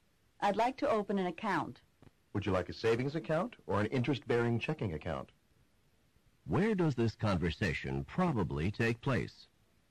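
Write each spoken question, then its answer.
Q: Where does this conversation probably take place?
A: At a bank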